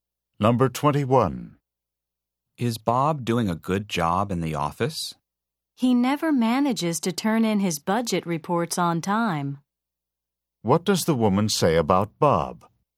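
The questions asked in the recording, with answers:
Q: What does the woman say about Bob?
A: He always turns in his budget reports late.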